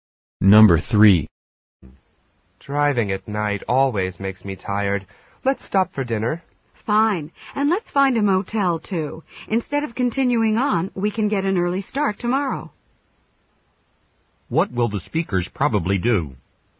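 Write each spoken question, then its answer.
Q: What will the speakers probably do?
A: Stop for dinner and stay at a motel for the night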